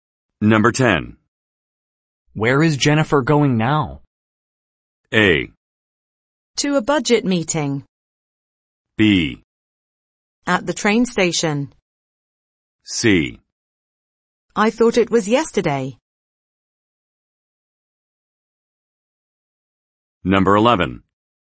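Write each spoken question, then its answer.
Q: Where is Jennifer going now?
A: A: To a budget meeting.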